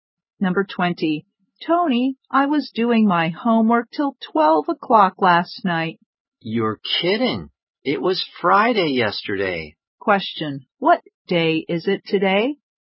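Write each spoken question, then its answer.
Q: What day is it today?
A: Saturday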